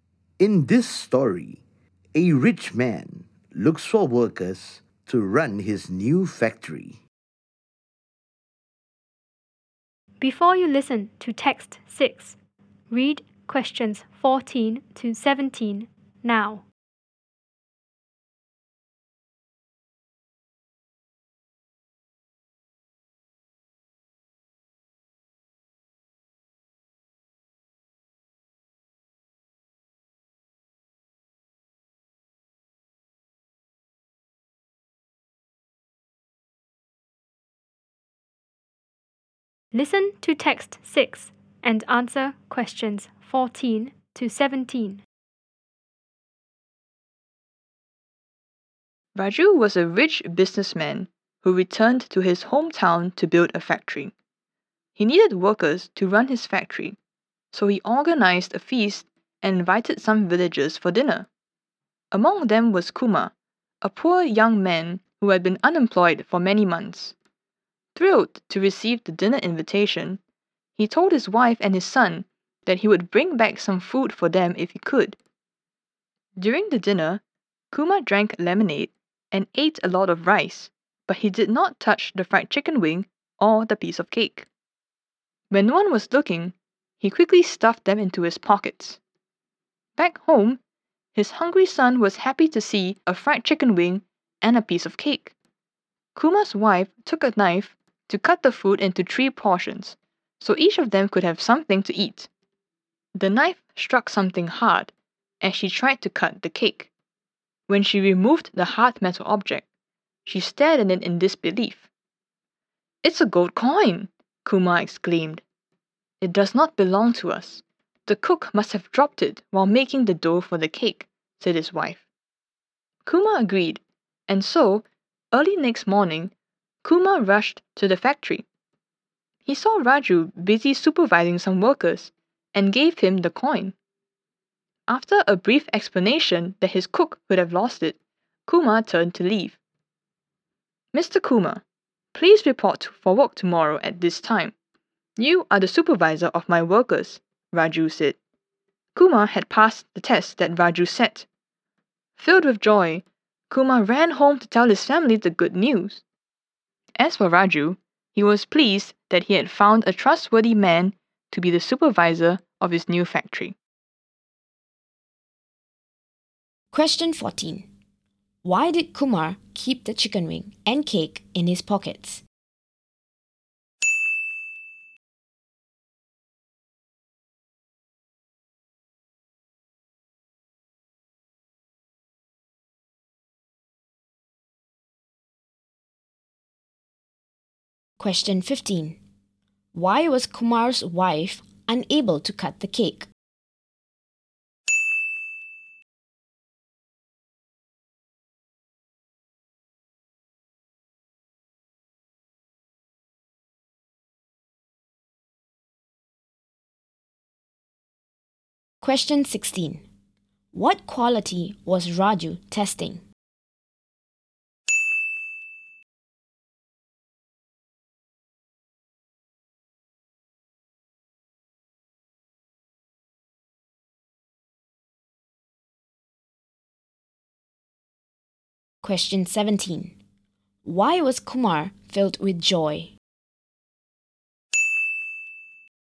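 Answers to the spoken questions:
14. To bring food back for his wife and son
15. There was a gold coin in it
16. Honesty (trustworthiness)
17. He got a job as supervisor of Raju's workers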